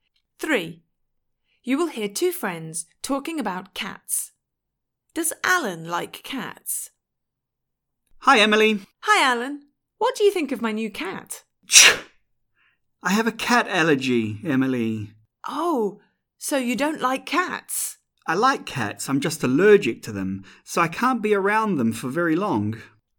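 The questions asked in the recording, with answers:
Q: Does Alan like cats?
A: Yes, but he is allergic to them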